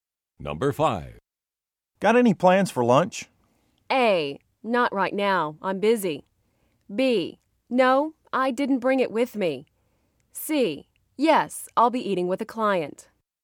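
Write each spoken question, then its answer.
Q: Got any plans for lunch?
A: C: Yes, I'll be eating with a client.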